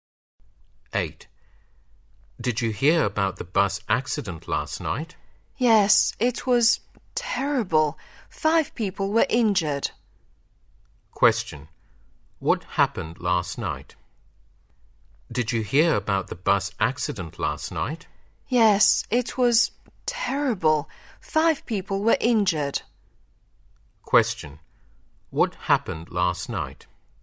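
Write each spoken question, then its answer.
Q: What happened last night?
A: A bus accident in which 5 people were injured.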